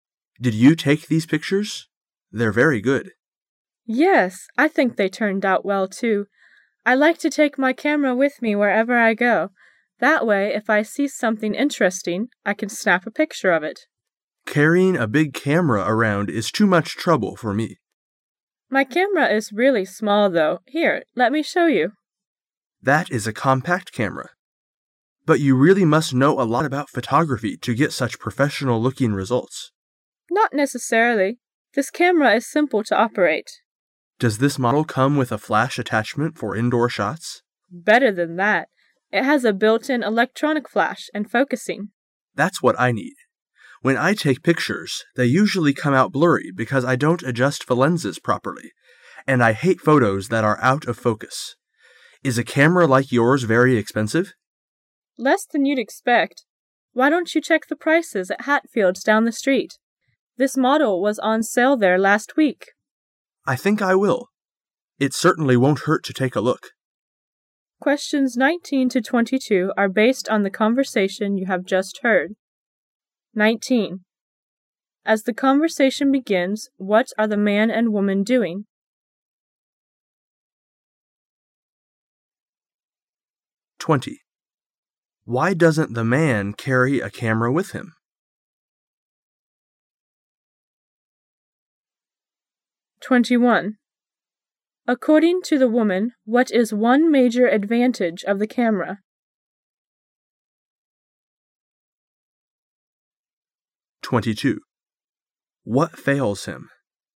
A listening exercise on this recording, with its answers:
Questions 19 to 22 are based on the conversation you have just heard.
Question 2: Why doesn't the man carry a camera with him?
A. He has a professional photographer take pictures for him.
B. He doesn't think he knows.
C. He doesn't have a flash attachment.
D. He thinks a big camera would be too much trouble.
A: D. He thinks a big camera would be too much trouble.

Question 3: According to the woman,what is one major advantage of the camera?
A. It focuses automatically.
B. It has a lot of specialized lenses.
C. It is easy to load.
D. It advances the film automatically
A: A. It focuses automatically.

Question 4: What fails him?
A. He can' t find good subjects to photograph.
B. His indoor shots are too dark.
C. His pictures are often blurry.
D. His camera is too old for good detail.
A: C. His pictures are often blurry.

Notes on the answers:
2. [解题思路]本题肯定是关于the man的情况的。 [详细解答] The man said:"She always liked to take the camera wherever she went and snapped everything interesting.But the man didn't.因为太麻烦,因而选D。
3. [解题思路] 本题是关于camera的性能的,具体指什么? [详细解答] 问题是the woman's camera's one major advantage.自然A是正确答案。
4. [解题思路] 关于the man's camera. [详细解答] The woman's camera has a built— in electronic flash and focusing.But the man's hasn't,and without indoor shots.那么他照相时会遇到什么问题呢?因此答案C。

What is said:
[解析] 19-22 M: Did you take these pictures? They're very good. W: Yes, I think they turned out well, too. I like to take my camera with me wherever I go. That way, if I see something interesting, I can snap a picture of it. M: Carrying a big camera around is too much trouble for me. W: My camera is really small, though. Here, let me show you. M: That is a compact camera. But you really must know a lot about photography to get such professional looking results. W: Not necessarily. This camera is simple to operate. M: Does this model come with a flash attachment for indoor shots? W: Better than that. It has a built - in electronic flash, and focusing. M: That's what I need. When I take pictures they usually come out blurry because I don' t adjust the lenses popery, and I hate photos that are out of focus. Is a camera like yours very expensive? W: Less than you'd expect. Why don't you check the prices at Hatfield's down the street? This model was on sale there last week. M: I think I will. It certainly won't hurt to take a look. 19.As the conversation begins,what are the man and woman doing?

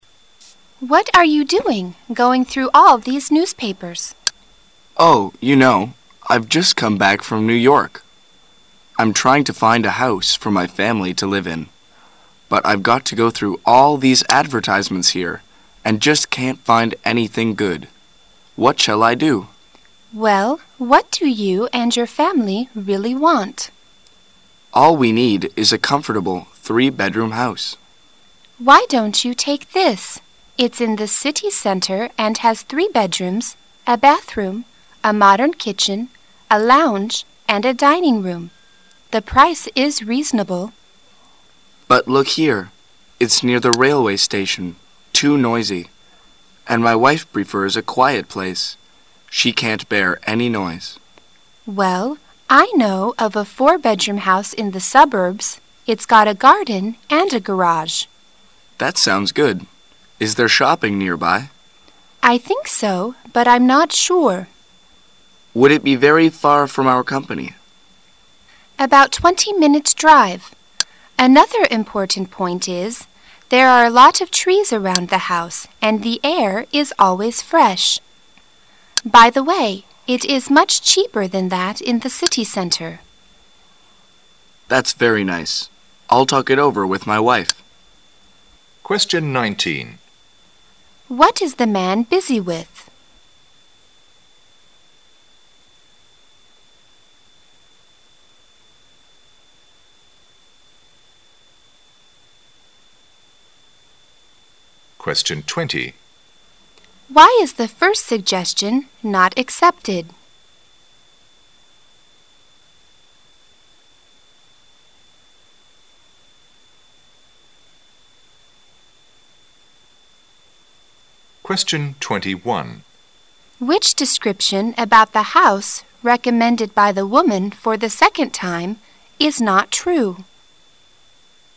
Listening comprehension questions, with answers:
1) Why is the first suggestion NOT accepted?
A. The price is too high.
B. The house is far from his company.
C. The place is noisy.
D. There is no shopping nearby.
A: C. The place is noisy.

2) Which description about the house recommended by the woman for the second time is NOT true?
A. It has a garden.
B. It is not in the city center.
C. It is not very expensive.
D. It is very far from the place the man works in.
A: D. It is very far from the place the man works in.

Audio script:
[解析] 19-21 W: Why are you doing going through all these newspapers? M: Oh, you know, I've just come back from New York. I'm trying to find a house for my family to live in. But I've got to go through all these advertisements here and just can't find anything good. What shall I do? W: Well, what do you and your family really want? M: All we need is a comfortable three-bedroom house. W: Why don't you take this. It's in the city center and has three bedrooms, a bathroom, a modern kitchen, a lounge, and a dining-room. The price is reasonable. M: But look here. It's near the railway station, too noisy. And my wife prefers a quiet place. She can't bear any noise. W: Well, I know of a four-bedroom house in the suburbs. It's got a garden and a garage. M: That sounds good. Is there shopping nearby? W: I think so, but I'm not sure. M: Would it be very far from our company? W: About 20 minutes' drive. Another important point is, there are a lot of trees around the house and the air is always fresh. By the way, it is much cheaper than that in the city center. M: That's very nice. I'll talk it over with my wife. What is the man busy with?

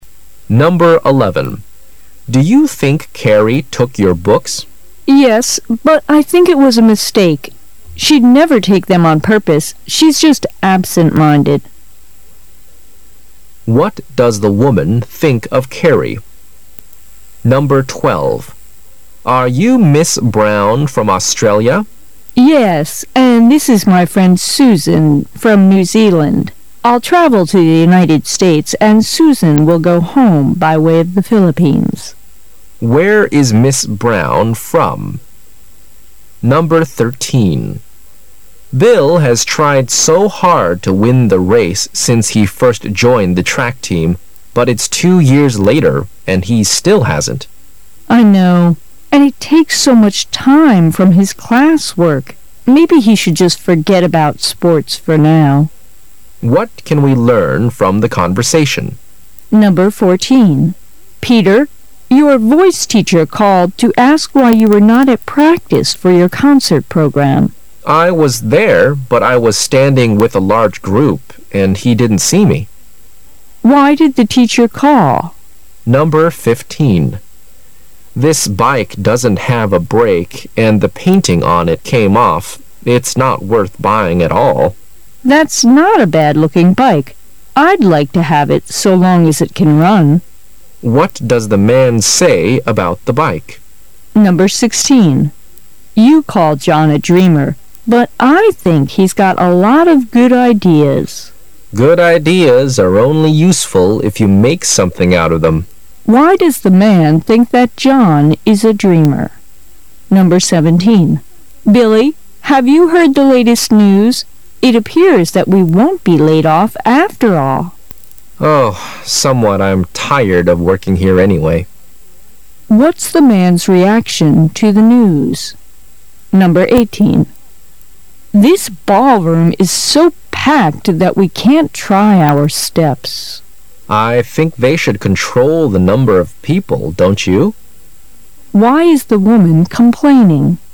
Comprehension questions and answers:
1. Why did the teacher call?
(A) Because he wanted to invite Peter to a concert.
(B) Because he thought Peter was not at practice for the concert program.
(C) Because he wanted Peter to join the large music group.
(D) Because he wanted to see Peter at home.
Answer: (B) Because he thought Peter was not at practice for the concert program.

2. Why is the woman complaining?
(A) The room is too crowded.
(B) The room is too small.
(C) The room is dirty with step stairs.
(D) They .couldn't play ball games.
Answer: (A) The room is too crowded.

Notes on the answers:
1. 本题关键在于but后面的内容,男士说我站在一大堆人里,他没有看见我,B)是对此信息的合理归纳。A)是根据concert设计的干扰项,是对对话的曲解;C)是根据group设计的干扰项,可由女士说的 why you were not at practice(为什么你没有去练习)可知Peter已经参加了该团体;D)是针对对话及问题中的call设计的干扰项,call在这里表示"打电话",而不是"走访,拜访"。

